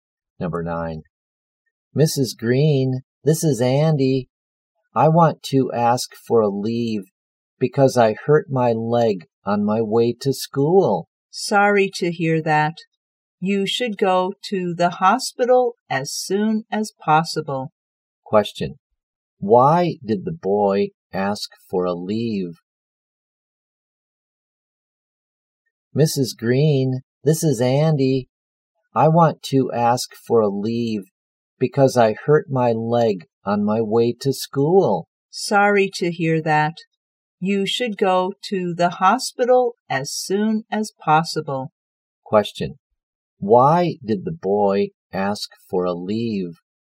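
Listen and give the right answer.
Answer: He hurt his leg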